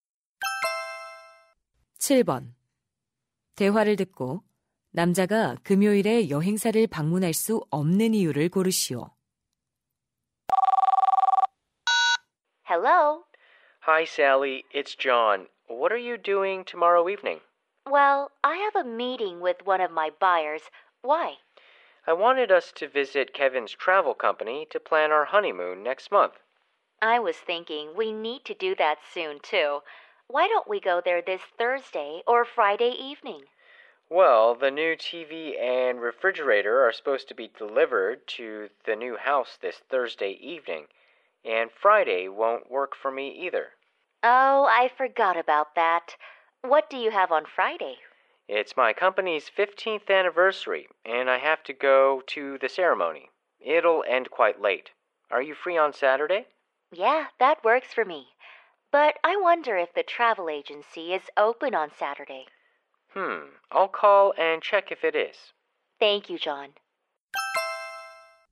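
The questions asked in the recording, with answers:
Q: 대화를 듣고 남자가 금요일에 여행사를 방문할 수 없는 이유를 고르시오.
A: 회사 창립 15주년 기념식에 가야 해서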